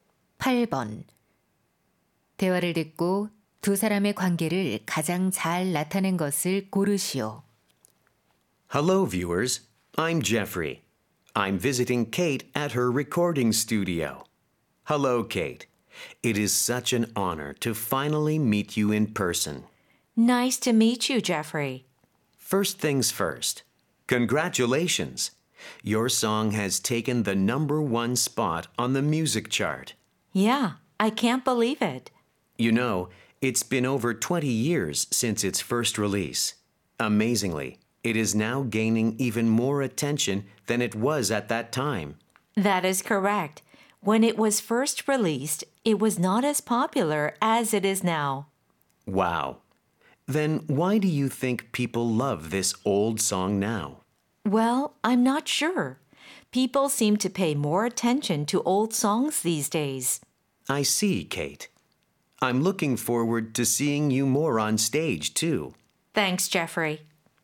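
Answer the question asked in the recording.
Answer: 진행자(인터뷰어) - 가수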